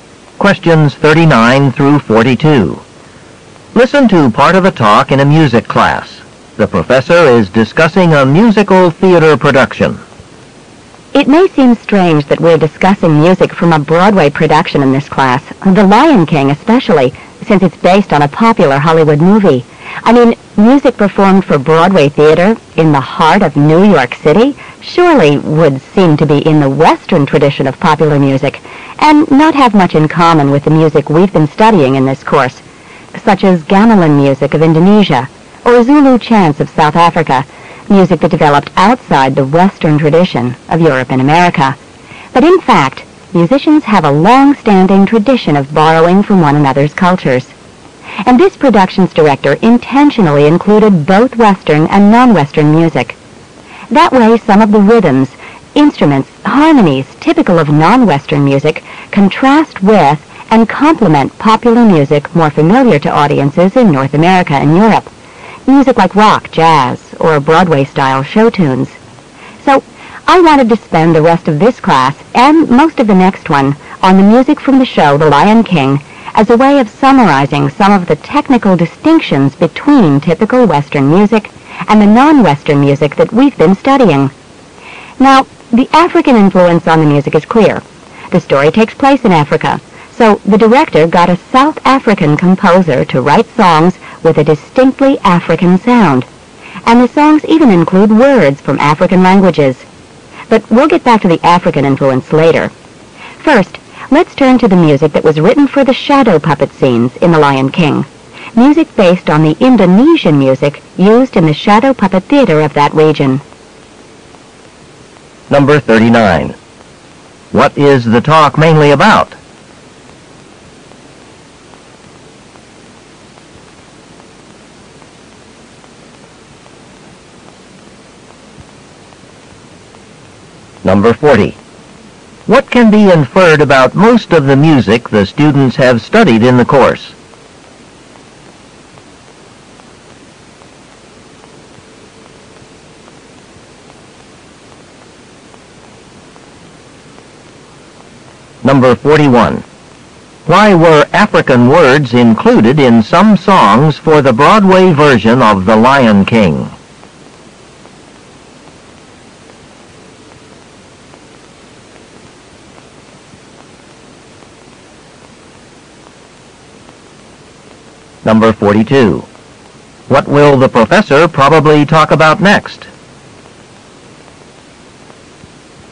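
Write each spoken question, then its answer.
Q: What is the talk mainly about?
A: Western and non-Western music in The Lion King

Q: What can be inferred about most of the music the students have studied in the course?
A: It developed outside the Western tradition

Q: Why were African words included in some songs for the Broadway version of The Lion King?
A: Because the story takes place in Africa

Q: What will the professor probably talk about next?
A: Indonesian-based music for the shadow puppet scenes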